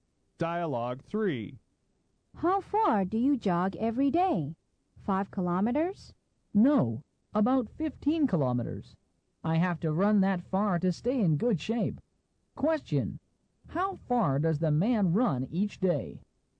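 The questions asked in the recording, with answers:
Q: How far does the man run each day?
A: About 15 kilometers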